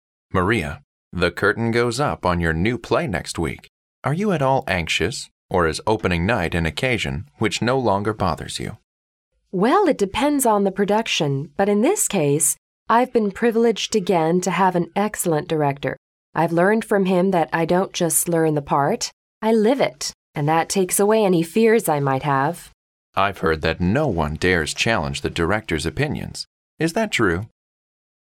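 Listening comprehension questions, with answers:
What does the woman most probably do?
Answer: She is an actress.

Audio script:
M: Maria, the curtain goes up on your new play next week. Are you at all anxious or is opening night an occasion which no longer bothers you?
W: Well, it depends on the production. But in this case, I've been privileged again to have an excellent director. I've learned from him that I don't just learn the part, I live it. And that takes away any fears I might have.
M: I've heard that no one dares to challenge the director's opinions. Is that true?

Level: C类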